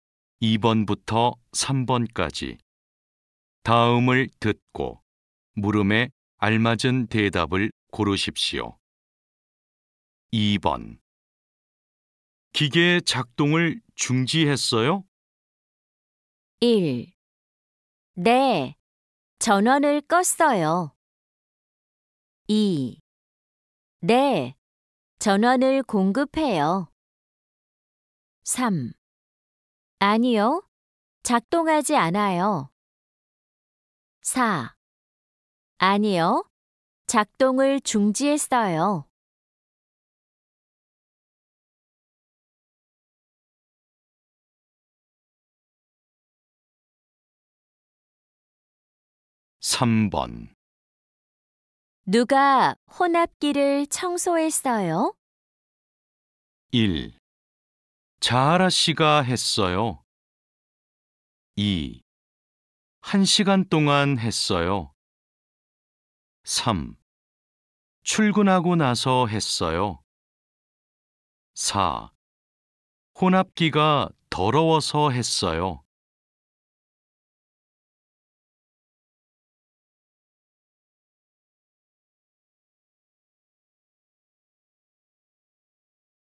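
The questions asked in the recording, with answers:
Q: 기계 작동을 중지했어요?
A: 1: 네, 전원을 껐어요.

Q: 누가 혼합기를 청소했어요?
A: 1: 자하라 씨가 했어요.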